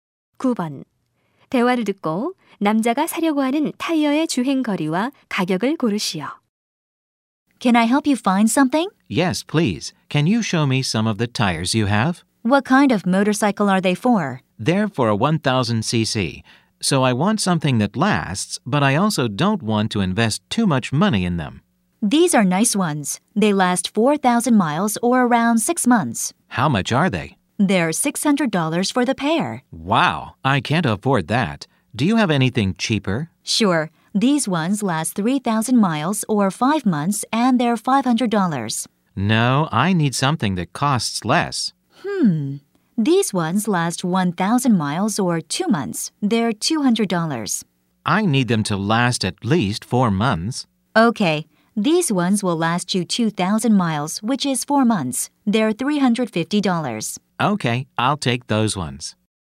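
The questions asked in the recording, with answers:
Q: 대화를 듣고 남자가 사려고 하는 타이어의 주행 거리와 가격을 고르시오.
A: 2,000마일, $350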